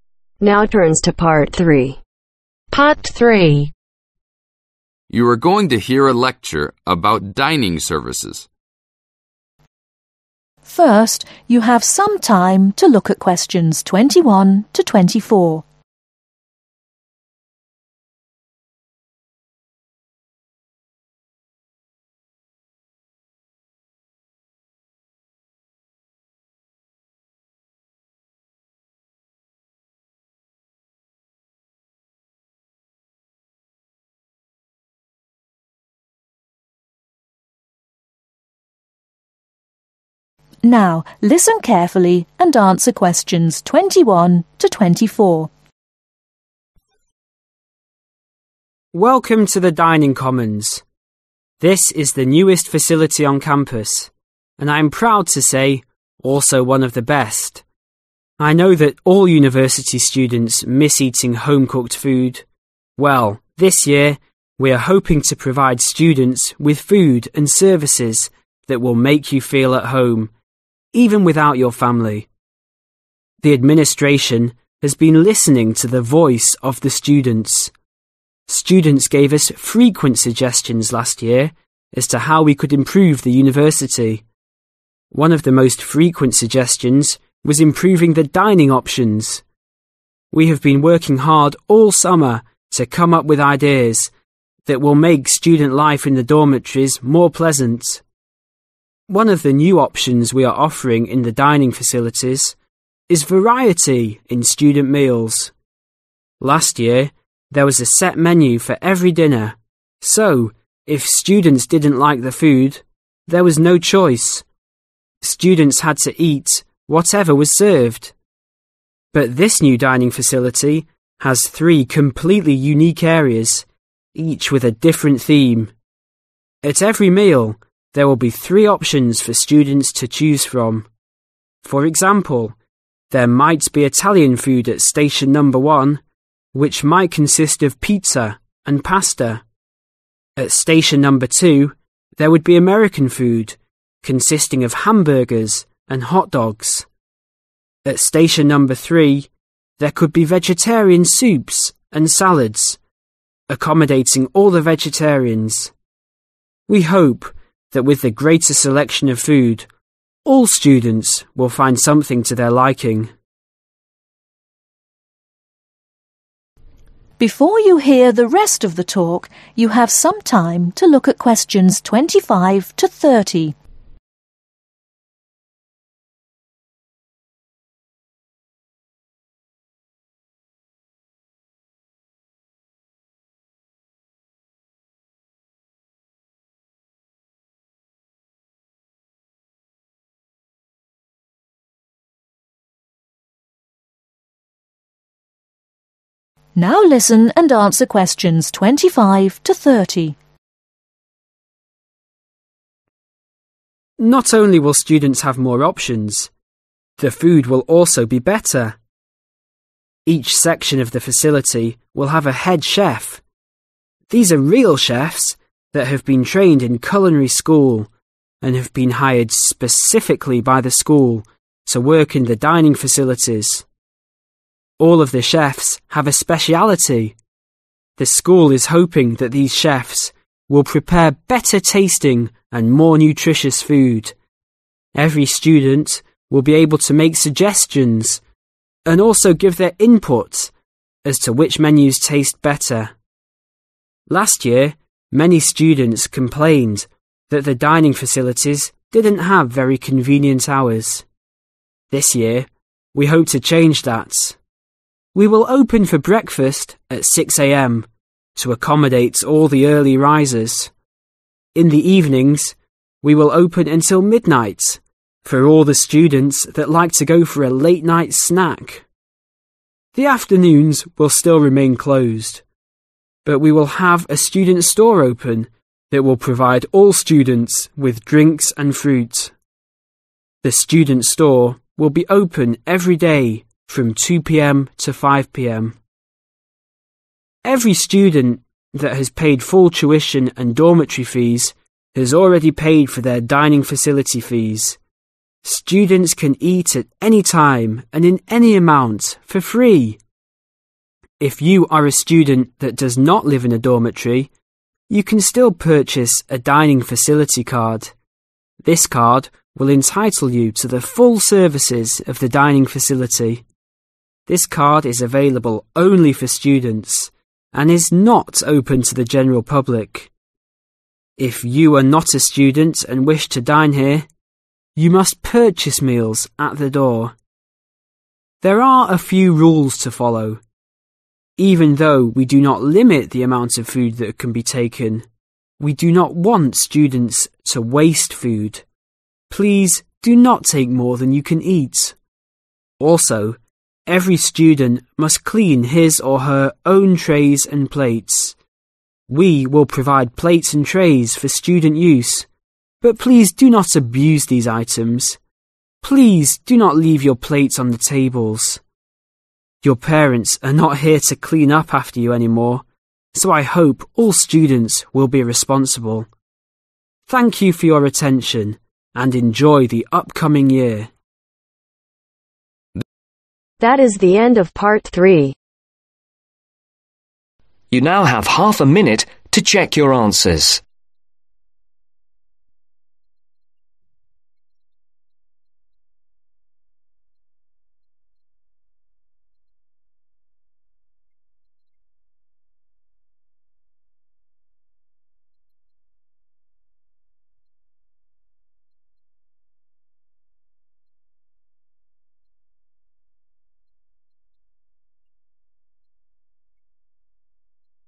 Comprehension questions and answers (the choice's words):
Circle the correct letters from A-C.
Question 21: What is one of the new advantages in the dining facilities ?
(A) more students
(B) more variety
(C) more service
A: more variety

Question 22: What was one problem with the dining options last year ?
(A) students did not have enough to eat.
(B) students had to pay too much money.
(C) students had to eat whatever was served.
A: students had to eat whatever was served.

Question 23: ............... and pasta are an example of Italian food.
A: PIZZA

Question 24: American food consists of Hamburgers and ............... .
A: HOT DOGS

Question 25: Why does the school say the food will be better ?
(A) They hired real chefs.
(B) The food is more expensive.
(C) They will make more kinds.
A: They hired real chefs.

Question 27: What can students do if they are hungry in the afternoon ?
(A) go out and buy food on the street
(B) wait till dinner time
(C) go to the student store for snacks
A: go to the student store for snacks

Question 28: What must you do to eat in the dining facilities if you are not a student ?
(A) purchase a dining facility card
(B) purchase meal at the door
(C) purchase meals from other students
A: purchase meal at the door